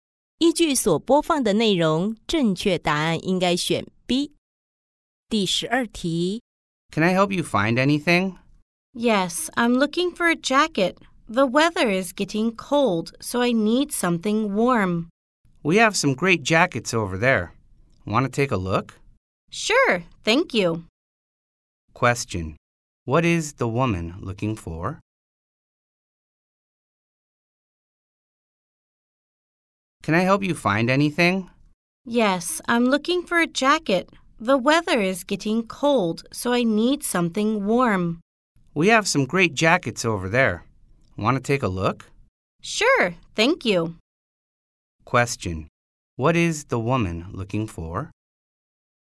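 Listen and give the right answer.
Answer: A jacket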